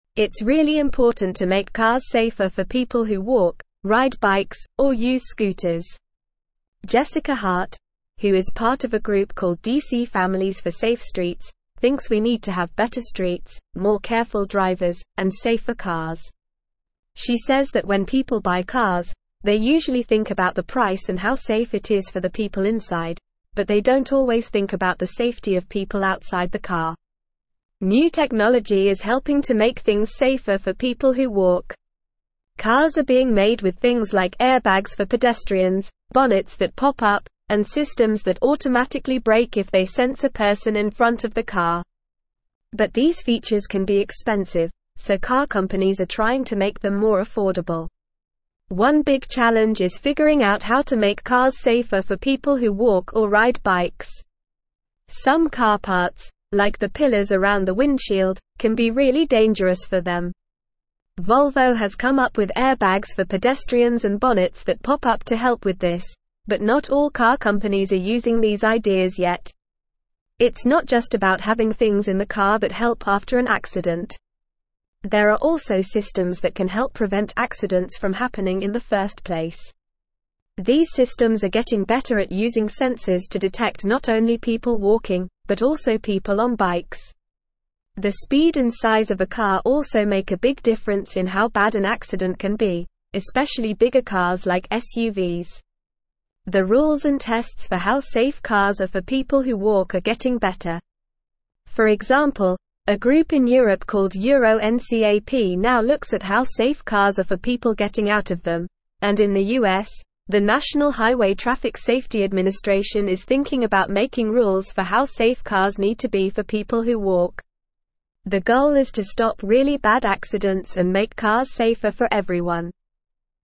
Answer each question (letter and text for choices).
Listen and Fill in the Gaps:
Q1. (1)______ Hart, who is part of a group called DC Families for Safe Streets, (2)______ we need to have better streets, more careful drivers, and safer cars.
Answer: Jessica

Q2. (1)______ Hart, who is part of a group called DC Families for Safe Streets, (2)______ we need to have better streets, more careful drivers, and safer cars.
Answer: thinks

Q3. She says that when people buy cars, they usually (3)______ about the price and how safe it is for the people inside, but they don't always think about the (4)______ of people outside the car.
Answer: safety

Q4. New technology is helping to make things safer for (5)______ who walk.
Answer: people

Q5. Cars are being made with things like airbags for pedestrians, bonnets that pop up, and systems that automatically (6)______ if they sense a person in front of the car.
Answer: brake

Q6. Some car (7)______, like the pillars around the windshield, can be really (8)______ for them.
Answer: parts

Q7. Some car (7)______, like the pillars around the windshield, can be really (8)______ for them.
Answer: dangerous

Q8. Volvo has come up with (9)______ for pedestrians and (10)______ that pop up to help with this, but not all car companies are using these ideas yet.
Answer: airbags

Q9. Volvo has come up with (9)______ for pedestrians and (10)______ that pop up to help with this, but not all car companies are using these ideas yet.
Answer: bonnets

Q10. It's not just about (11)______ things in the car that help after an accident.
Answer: having

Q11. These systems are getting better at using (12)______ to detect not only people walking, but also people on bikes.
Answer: sensors

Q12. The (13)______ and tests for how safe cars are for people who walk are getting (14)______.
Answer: rules

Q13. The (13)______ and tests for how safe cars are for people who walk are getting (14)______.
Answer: better

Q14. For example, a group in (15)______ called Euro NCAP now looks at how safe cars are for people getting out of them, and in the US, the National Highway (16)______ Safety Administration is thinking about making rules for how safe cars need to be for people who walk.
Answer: Europe

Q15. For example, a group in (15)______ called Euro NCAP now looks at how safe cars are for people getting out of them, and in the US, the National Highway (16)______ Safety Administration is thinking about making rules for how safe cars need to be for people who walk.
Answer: Traffic

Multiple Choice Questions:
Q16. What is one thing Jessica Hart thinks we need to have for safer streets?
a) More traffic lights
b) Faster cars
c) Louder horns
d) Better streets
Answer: d) Better streets

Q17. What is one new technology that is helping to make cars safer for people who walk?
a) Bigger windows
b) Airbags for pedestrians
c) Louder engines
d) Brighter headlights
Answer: b) Airbags for pedestrians

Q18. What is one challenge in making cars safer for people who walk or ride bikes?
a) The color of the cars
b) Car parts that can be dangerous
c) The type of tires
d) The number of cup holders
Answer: b) Car parts that can be dangerous

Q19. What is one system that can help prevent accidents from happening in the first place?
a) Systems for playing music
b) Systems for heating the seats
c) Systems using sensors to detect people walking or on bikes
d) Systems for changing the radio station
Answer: c) Systems using sensors to detect people walking or on bikes

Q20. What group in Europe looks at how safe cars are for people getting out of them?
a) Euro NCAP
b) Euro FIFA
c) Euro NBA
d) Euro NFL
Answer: a) Euro NCAP

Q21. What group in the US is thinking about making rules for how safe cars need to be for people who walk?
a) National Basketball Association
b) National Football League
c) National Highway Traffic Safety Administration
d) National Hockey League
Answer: c) National Highway Traffic Safety Administration

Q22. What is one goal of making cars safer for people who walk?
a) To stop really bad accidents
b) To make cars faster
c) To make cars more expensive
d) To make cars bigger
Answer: a) To stop really bad accidents

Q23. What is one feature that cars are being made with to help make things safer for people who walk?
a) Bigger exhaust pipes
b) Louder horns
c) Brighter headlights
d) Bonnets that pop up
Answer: d) Bonnets that pop up

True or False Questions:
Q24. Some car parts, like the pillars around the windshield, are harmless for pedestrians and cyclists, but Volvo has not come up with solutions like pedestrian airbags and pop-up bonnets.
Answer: False

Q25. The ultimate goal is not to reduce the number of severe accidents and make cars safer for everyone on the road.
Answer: False

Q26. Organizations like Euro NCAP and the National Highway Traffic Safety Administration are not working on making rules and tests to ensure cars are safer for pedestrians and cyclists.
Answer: False

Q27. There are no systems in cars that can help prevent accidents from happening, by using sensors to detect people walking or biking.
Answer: False

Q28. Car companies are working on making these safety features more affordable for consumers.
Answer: True

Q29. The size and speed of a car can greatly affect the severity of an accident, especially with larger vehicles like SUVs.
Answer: True

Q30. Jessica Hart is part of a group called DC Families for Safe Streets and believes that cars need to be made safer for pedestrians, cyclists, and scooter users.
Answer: True

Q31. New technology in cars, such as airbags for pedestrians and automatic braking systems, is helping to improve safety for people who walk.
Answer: True

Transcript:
It's really important to make cars safer for people who walk, ride bikes, or use scooters. Jessica Hart, who is part of a group called DC Families for Safe Streets, thinks we need to have better streets, more careful drivers, and safer cars. She says that when people buy cars, they usually think about the price and how safe it is for the people inside, but they don't always think about the safety of people outside the car.
New technology is helping to make things safer for people who walk. Cars are being made with things like airbags for pedestrians, bonnets that pop up, and systems that automatically brake if they sense a person in front of the car. But these features can be expensive, so car companies are trying to make them more affordable.
One big challenge is figuring out how to make cars safer for people who walk or ride bikes. Some car parts, like the pillars around the windshield, can be really dangerous for them. Volvo has come up with airbags for pedestrians and bonnets that pop up to help with this, but not all car companies are using these ideas yet.
It's not just about having things in the car that help after an accident. There are also systems that can help prevent accidents from happening in the first place. These systems are getting better at using sensors to detect not only people walking, but also people on bikes. The speed and size of a car also make a big difference in how bad an accident can be, especially bigger cars like SUVs.
The rules and tests for how safe cars are for people who walk are getting better. For example, a group in Europe called Euro NCAP now looks at how safe cars are for people getting out of them, and in the US, the National Highway Traffic Safety Administration is thinking about making rules for how safe cars need to be for people who walk. The goal is to stop really bad accidents and make cars safer for everyone.

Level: Level 3